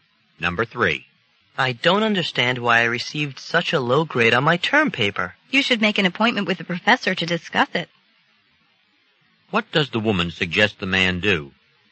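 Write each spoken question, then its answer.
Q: What does the woman suggest the man do?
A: Make an appointment to talk to the professor about his grade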